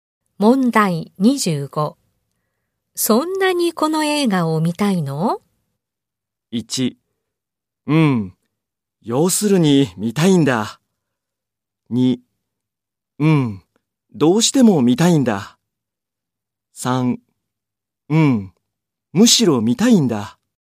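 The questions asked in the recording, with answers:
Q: そんなにこの映画を見たいの?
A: 2: うん。どうしても見たいんだ。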